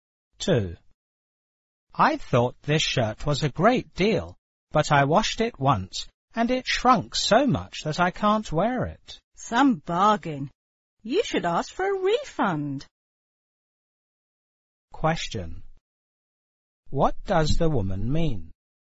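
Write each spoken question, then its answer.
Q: What does the woman mean?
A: The shirt was not a real bargain, and the man should ask for a refund.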